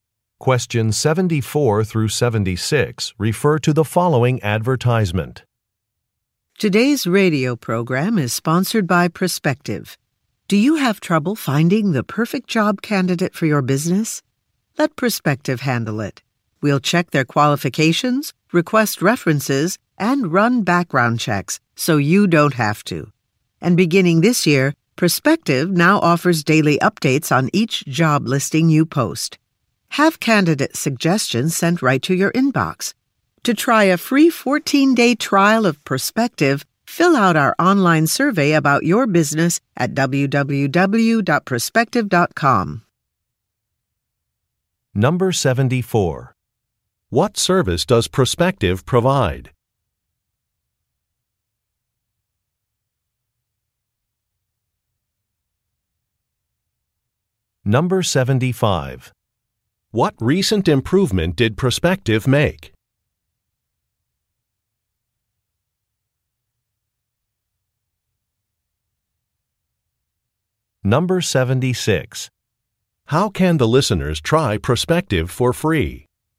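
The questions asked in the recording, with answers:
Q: What service does Perspective provide?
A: Finding and screening job candidates

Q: What recent improvement did Perspective make?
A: It offers daily updates on job listings

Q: How can the listeners try Perspective for free?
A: By filling out an online survey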